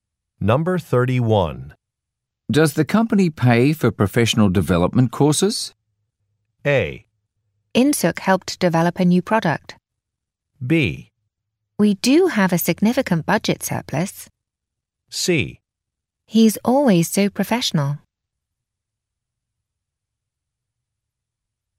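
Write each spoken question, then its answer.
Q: Does the company pay for professional development courses?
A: B: We do have a significant budget surplus.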